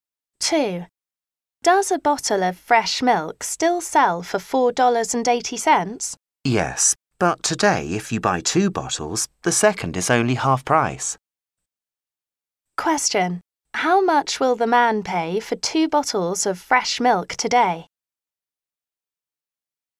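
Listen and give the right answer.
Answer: $7.20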